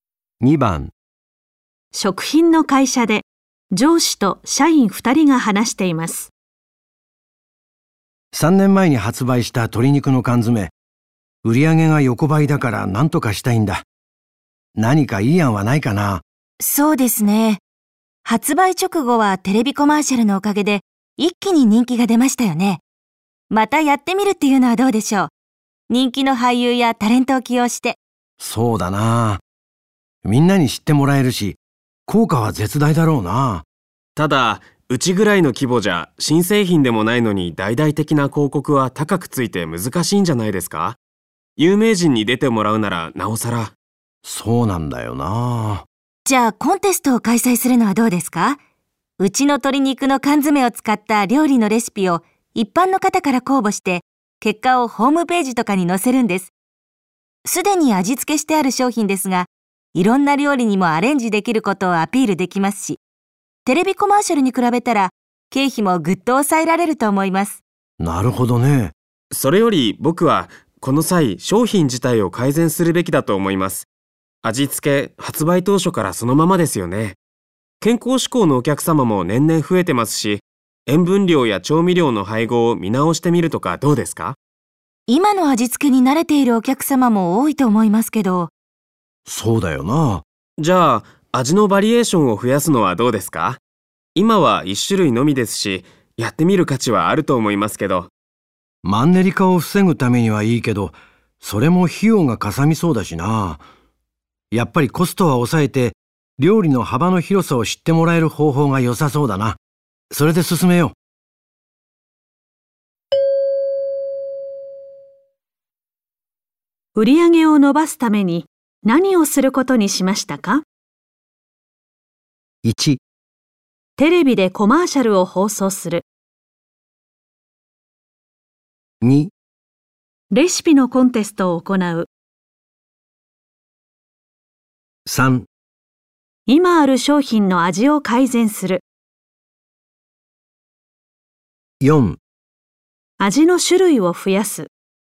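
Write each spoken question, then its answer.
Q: 売上を伸ばすために何をすることにしましたか?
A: 2: レシピのコンテストを行う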